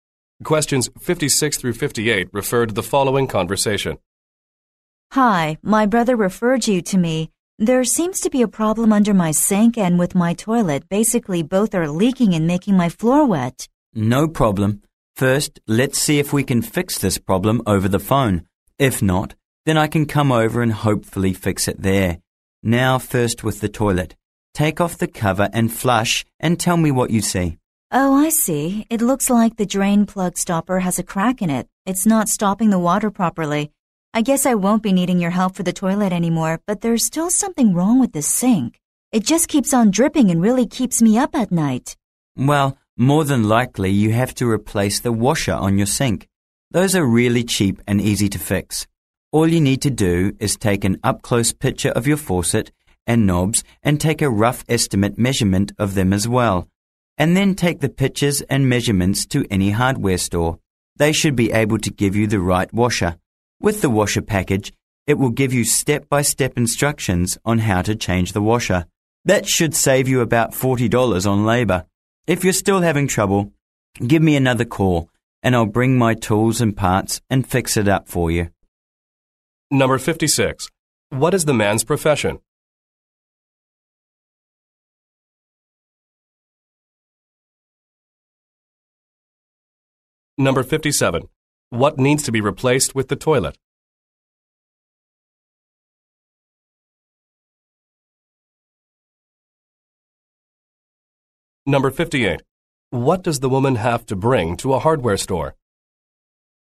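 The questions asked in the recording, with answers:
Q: What is the man's profession?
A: Plumber

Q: What needs to be replaced with the toilet?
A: The drain plug stopper

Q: What does the woman have to bring to a hardware store?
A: Pictures and measurements of her faucet and knobs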